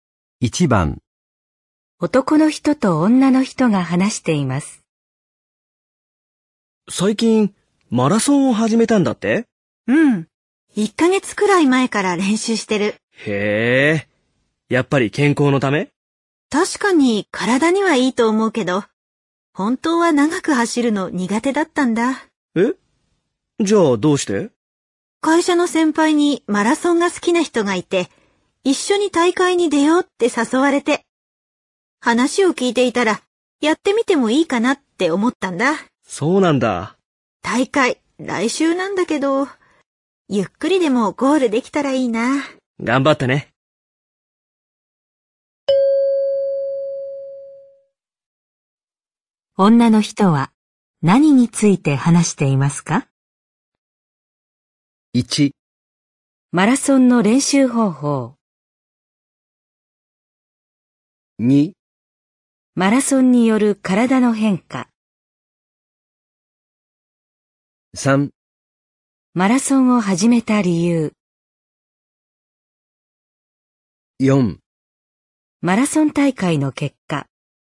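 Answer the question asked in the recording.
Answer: 3: マラソンを始めた理由。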